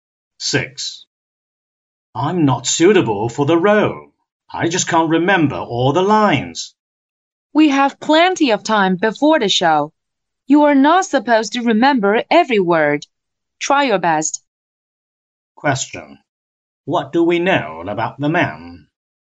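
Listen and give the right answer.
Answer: He is worried he can't remember his lines for the show.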